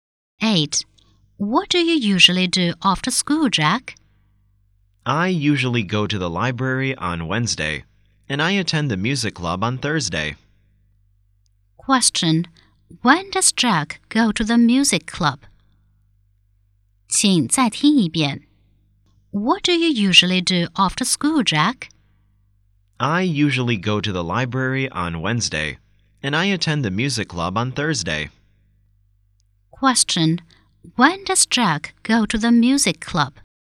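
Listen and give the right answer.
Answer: On Thursday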